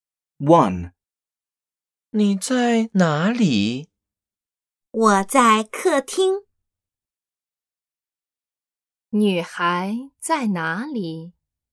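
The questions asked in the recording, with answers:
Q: 女孩在哪里?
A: 在客厅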